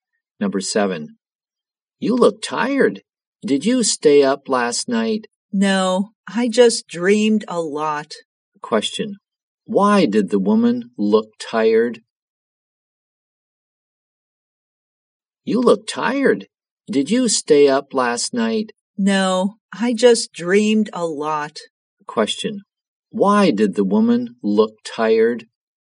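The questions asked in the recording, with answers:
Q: Why did the woman look tired?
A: She dreamed a lot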